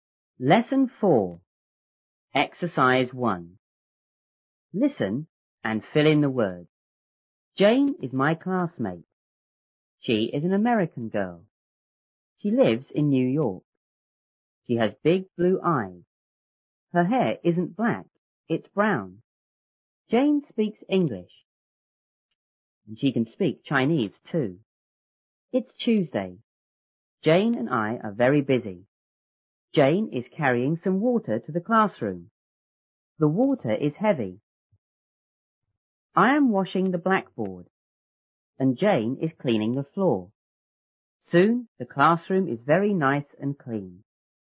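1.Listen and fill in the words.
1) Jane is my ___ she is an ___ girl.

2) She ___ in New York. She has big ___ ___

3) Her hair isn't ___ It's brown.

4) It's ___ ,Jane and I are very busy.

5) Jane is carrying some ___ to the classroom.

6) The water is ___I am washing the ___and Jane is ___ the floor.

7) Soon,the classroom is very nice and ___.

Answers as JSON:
{"1": "classmate; American", "2": "lives; blue eyes", "3": "black", "4": "Tuesday", "5": "water", "6": "heavy; blackboard; cleaning", "7": "clean"}

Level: 初中英语广州版1B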